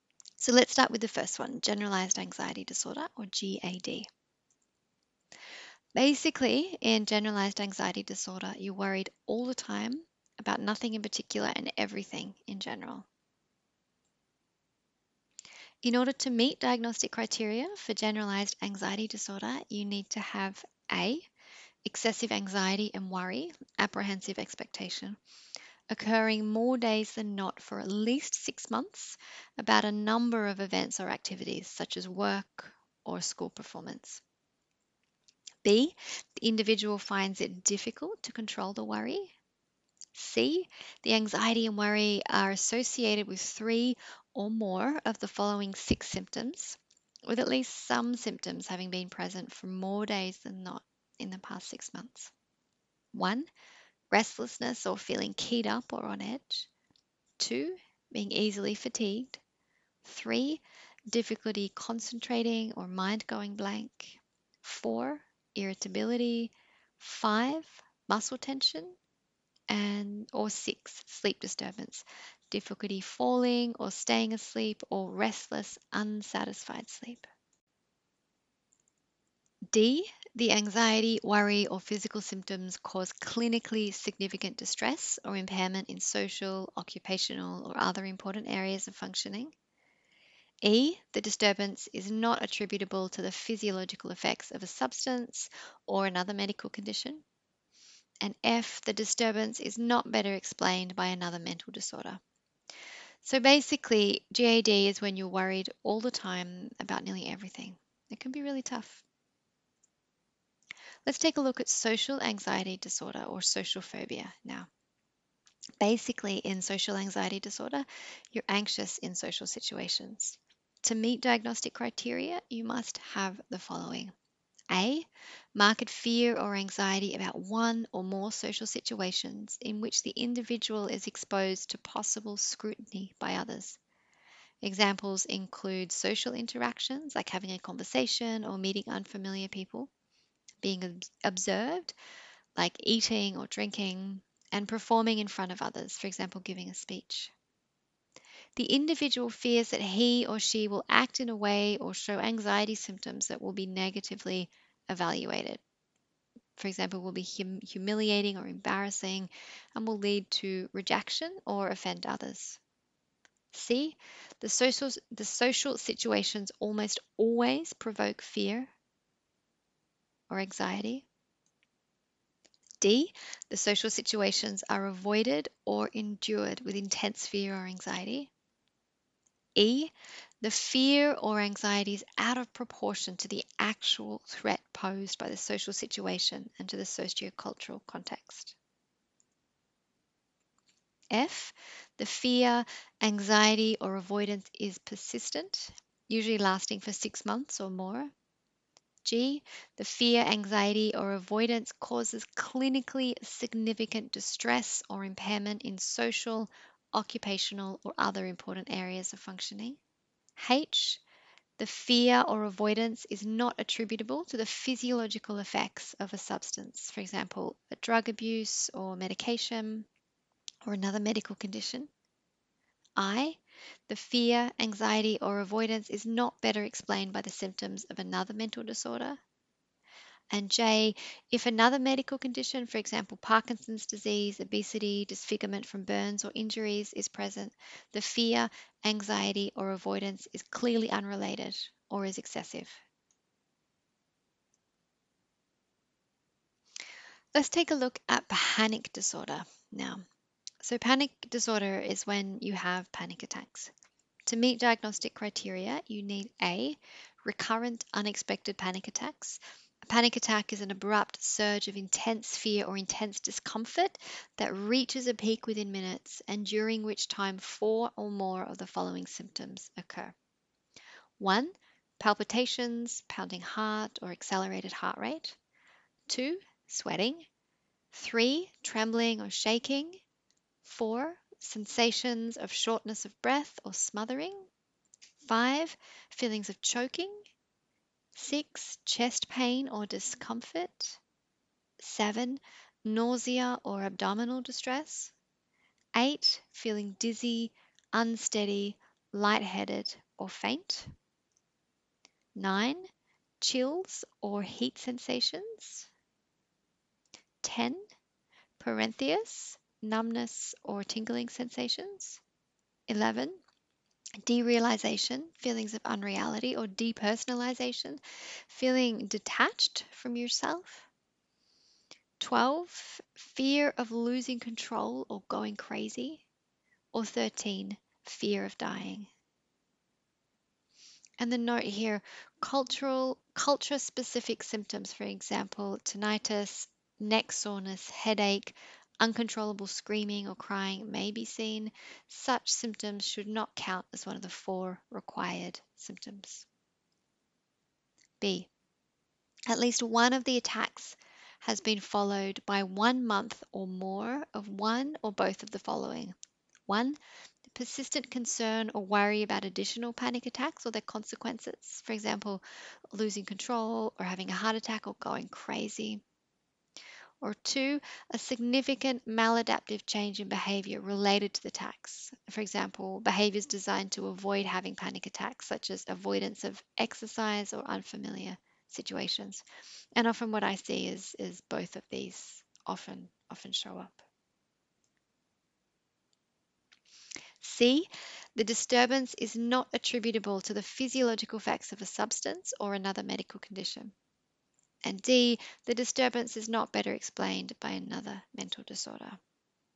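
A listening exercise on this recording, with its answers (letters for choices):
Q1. A student tells you that they were diagnosed with Generalised Anxiety Disorder by their Psychologist. This might mean that the student:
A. Feels anxious in social situations, but not in any other situations.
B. Is worried about a job interview they have next week.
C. Is worried about a wide range of events or activities, and this worry is difficult to control and occurs more days than not.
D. None of the above.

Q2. A student tells you that they were diagnosed with Social Anxiety Disorder by their Psychologist. This might mean that the student:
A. Feels anxious in social situations, fearing that they will be negatively evaluated.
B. Feels anxious all of the time, even when alone.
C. Doesn't have any friends.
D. None of the above.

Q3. A student tells you that they were diagnosed with Panic Disorder by their Doctor. 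This might mean that the student:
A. Has had a previous panic attack.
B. Is worried that they will have another panic attack.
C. Has changed their behaviour to avoid having another panic attack.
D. All of the above.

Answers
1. C
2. A
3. D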